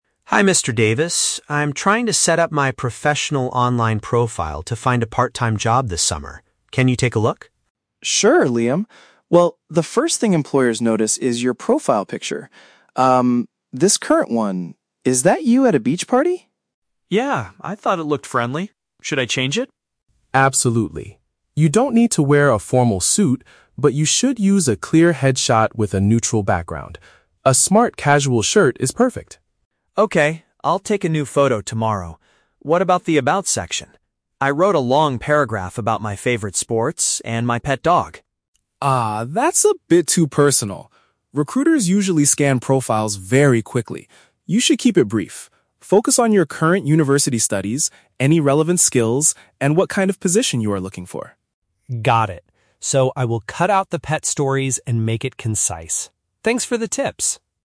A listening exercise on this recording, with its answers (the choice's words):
Listen to a conversation between a student and a career advisor. For each question, choose the correct answer (A, B, or C).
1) What is the problem with Liam's current profile picture?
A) He is wearing a very expensive formal suit.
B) It was taken in an unprofessional setting.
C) The background behind him is completely blank.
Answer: It was taken in an unprofessional setting.

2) What does Mr. Davis suggest Liam wear for his new photo?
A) Heavy winter clothing.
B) Traditional business clothes.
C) A neat and acceptable top.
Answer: A neat and acceptable top.

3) How should Liam modify his introduction section?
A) Make the text much shorter and job-focused.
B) Add more details about his personal interests.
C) Write a long story about his university life.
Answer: Make the text much shorter and job-focused.

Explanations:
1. Mr. Davis notices the photo is from a "beach party," which is an unprofessional setting for a job profile. Option (A) is a trap; Mr. Davis mentions a "formal suit" later to say Liam doesn't need one. Option (C) is a trap; a "neutral background" is what Mr. Davis recommends for the new photo, not the current one.
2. Mr. Davis suggests wearing a "smart-casual shirt", which means a neat and acceptable top. Option (B) is a trap; Mr. Davis explicitly says, "You don't need to wear a formal suit" (traditional business clothes). Option (A) is never mentioned.
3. Mr. Davis tells Liam to "keep it brief" (make it shorter) and focus on his studies, skills, and the position he wants (job-focused). Option (B) is a trap; Liam currently has his personal interests (sports, pet dog) in the profile, but Mr. Davis says it is "too personal". Option (C) is a trap; he shouldn't write a "long story" because recruiters scan profiles quickly.

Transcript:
Liam: Hi Mr. Davis. I'm trying to set up my professional online profile to find a part-time job this summer. Can you take a look?
Mr. Davis: Sure, Liam. Well, the first thing employers notice is your profile picture. Um, this current one... is that you at a beach party?
Liam: Yeah, I thought it looked friendly. Should I change it?
Mr. Davis: Absolutely. You don't need to wear a formal suit, but you should use a clear headshot with a neutral background. A smart-casual shirt is perfect.
Liam: Okay, I'll take a new photo tomorrow. What about the "About" section? I wrote a long paragraph about my favorite sports and my pet dog.
Mr. Davis: Ah, that's a bit too personal. Recruiters usually scan profiles very quickly. You should keep it brief. Focus on your current university studies, any relevant skills, and what kind of position you are looking for.
Liam: Got it. So, I will cut out the pet stories and make it concise. Thanks for the tips!